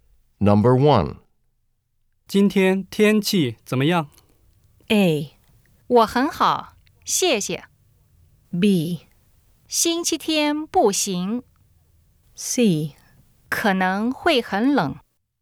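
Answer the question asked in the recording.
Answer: C: 可能会很冷。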